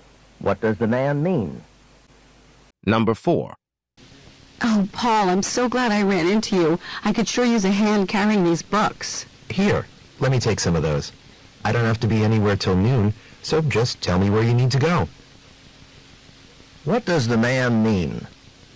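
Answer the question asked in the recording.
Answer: He is happy to help carry the books wherever she needs to go.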